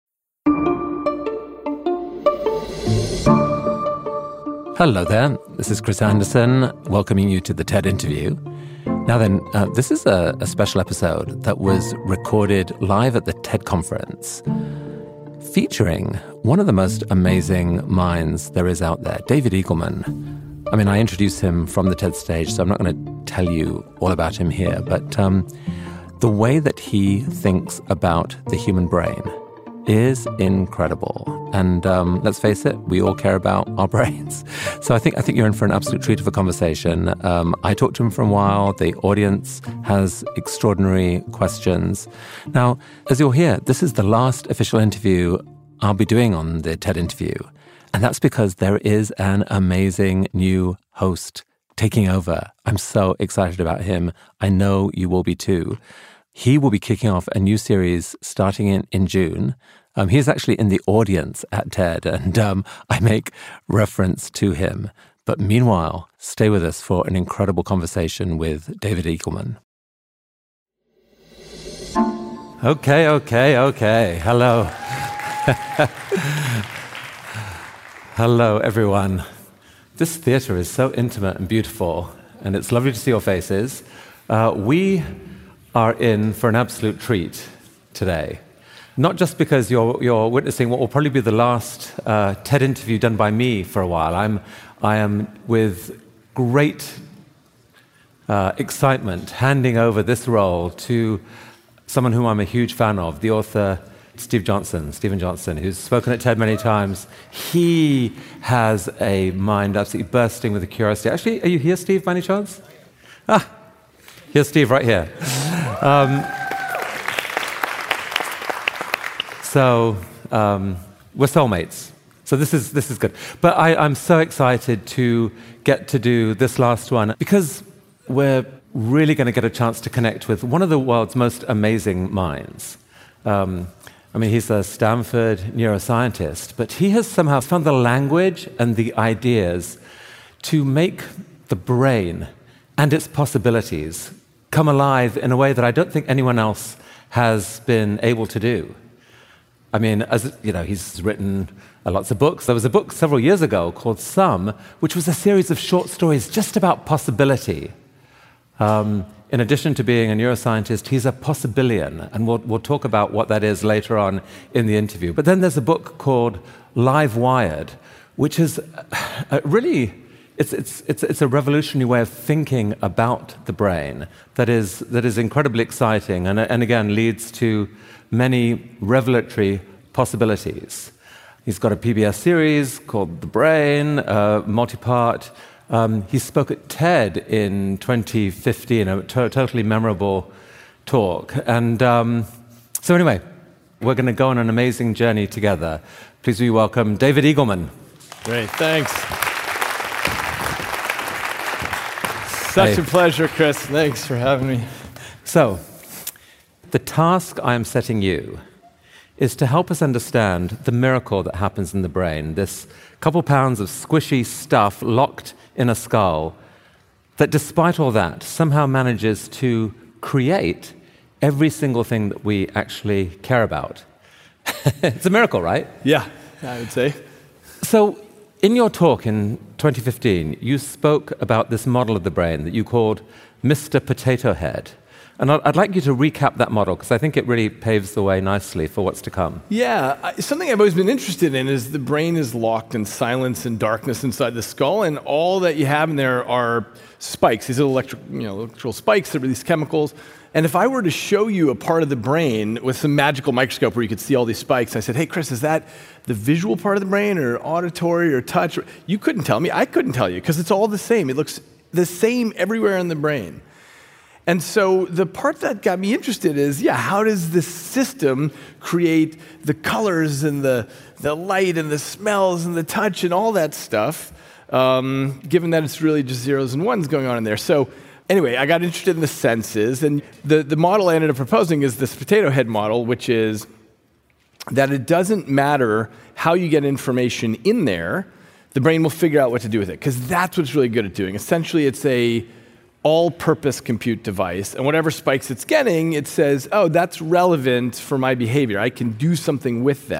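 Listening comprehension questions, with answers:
用 1-2 句话用自己的话回答下面的问题。点「✨ AI 判断」后,AI 会对照当天 transcript 给出参考要点与评分。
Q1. Who is the new host taking over The TED Interview, and what is his profession or notable trait mentioned by Chris Anderson?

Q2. According to David Eagleman, if you looked at brain spikes through a magical microscope, what would you be unable to tell, and what are the spikes actually doing?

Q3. What is the title of David Eagleman's PBS series, and in what year did he give his TED talk that Chris Anderson describes as "totally memorable"?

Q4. Chris Anderson mentions two of David Eagleman's books. What are their titles, and what is one specific description Chris gives for each?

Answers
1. Steven Johnson, an author who has spoken at TED many times and has a mind bursting with curiosity.
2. You couldn't tell whether it is the visual, auditory or touch part of the brain; the spikes are electrical spikes that release chemicals.
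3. The Brain; 2015.
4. Sum, a series of short stories about possibility; Livewired, a revolutionary way of thinking about the brain.

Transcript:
Chris Anderson
Hello there. This is Chris Anderson, welcoming you to The TED Interview. Now then, uh, this is a, a special episode that was recorded live at the TED Conference featuring one of the most amazing minds there is out there: David Eagleman. I mean, I introduce him from the TED stage, so I'm not gonna tell you all about him here, but, um, the way that he thinks about the human brain is incredible.
And, um, let's face it, we all care about our brains. So I think, I think you're in for an absolute treat of a conversation. Um, I talked to him for a while. The audience has extraordinary questions. Now, as you'll hear, this is the last official interview I'll be doing on The TED Interview, and that's because there is an amazing new host taking over.I'm so excited about him. 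I know you will be too. He will be kicking off a new series starting in, in June. Um, he's actually in the audience at TED, and um, I make reference to him. But meanwhile, stay with us for an incredible conversation with David Eagleman.
Okay. Okay. Okay. Hello. Hello everyone. This theater is so intimate and beautiful and it's lovely to see your faces. Uh, we are in for an absolute treat today, not just because you are, you are witnessing what will probably be the last, uh, TED interview done by me for a while. I'm, I am with great, uh, excitement handing over this role to someone who I'm a huge fan of: the author Steve Johnson. Steven Johnson, who's spoken at TED many times. He has a mind absolutely bursting with a curiosity. Actually, are you here, Steve, by any chance? Ah, here's Steve. Right here.
Um, so, um, we're soulmates, so this is, this is good. But I, I'm so excited to get to do this last one because we're really gonna get a chance to connect with one of the world's most amazing minds. 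Um, I mean, he's a Stanford neuroscientist, but he has somehow found the language and the ideas to make the brain and its possibilities come alive in a way that I don't think anyone else has been able to do.
I mean, as you know, he's written lots of books. There was a book several years ago called Some, which was a series of short stories, just about possibility. Um, in addition to being a neuroscientist, he's a possibilian and we'll, we'll talk about what that is later on in the interview. But then there's a book called Live Wired, which is, uh, really, it's, it's, it's, it's a revolutionary way of thinking about the brain.
That is, that is incredibly exciting and, and again, leads to many revelatory possibilities. He's got a PBS series called The Brain, a multipart. Um, he spoke at TED in 2015, a totally memorable talk. And, um, so anyway, we're gonna go on an amazing journey together. 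Please welcome David Eagleman.
David Eagleman
Great, thanks. such a pleasure, Chris. Thanks for having me.
Chris Anderson
Thanks for having me.
[0003:25] Chris Anderson: So, the task I am setting you is to help us understand the miracle that happens in the brain. This couple pounds of squishy stuff locked in a skull that despite all that, somehow manages to create every single thing that we actually care about. It's a miracle, right?
David EaglemanYeah. I would say.
[0003:48] Chris Anderson: So, in your talk in 2015, you spoke about this model of the brain that you called Mr. Potato Head, and I'd like you to recap that model. 'Cause I think it really paves the way nicely for what's to come.
[0004:00] David Eagleman: Yeah. Something I've always been interested in is the brain is locked in silence and darkness inside the skull and all that you have in there are spikes. These electric, you know, electrical spikes that release chemicals. 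And if I were to show you a part of the brain with some magical microscope where you could see all these spikes, and I said, "Hey Chris, is that the visual part of the brain or auditory or touch?" You couldn't tell me. I couldn't tell you 'cause it's all the same.
It looks the same everywhere in the brain. And so the part that got me interested is, yeah, how does the system create the colors and the, the light and the smells and the touch and all that stuff, um, given that it's really just zeros and ones going on in there? So anyway, I got interested in the senses and the, the model I ended up proposing is this potato head model, which is that it doesn't matter how you get information in there, the brain will figure out what to do with it.
'Cause that's what's really good at doing, essentially it's a all-purpose compute device, and whatever spikes it's getting, it says, "Oh, that's relevant for my behavior.

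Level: CEFRB2-C1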